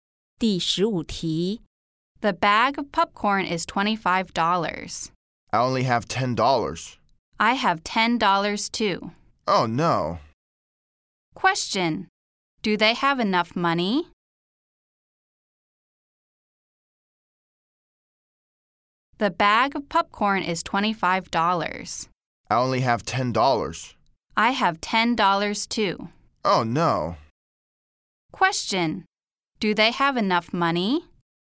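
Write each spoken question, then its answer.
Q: Do they have enough money?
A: No, they only have $20 and it costs $25.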